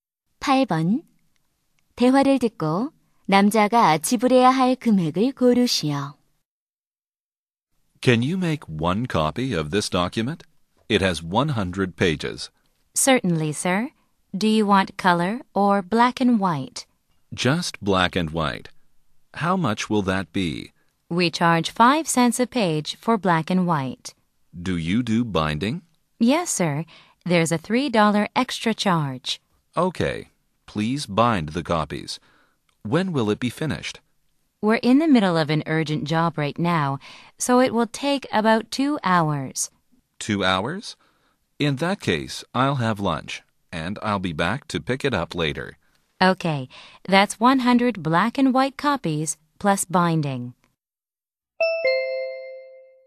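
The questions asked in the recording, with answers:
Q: 대화를 듣고 남자가 지불해야 할 금액을 고르시오.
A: 8달러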